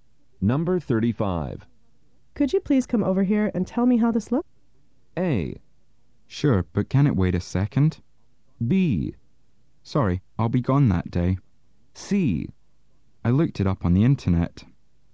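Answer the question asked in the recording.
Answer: A: Sure, but can it wait a second?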